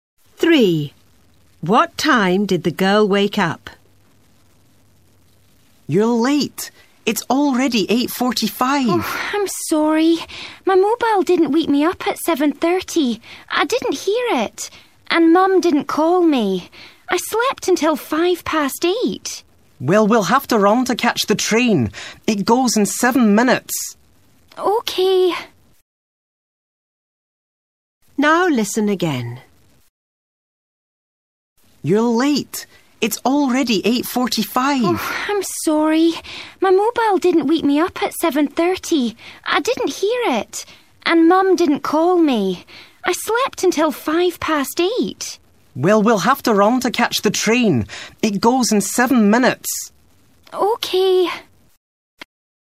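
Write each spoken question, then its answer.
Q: What time did the girl wake up?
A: 8:05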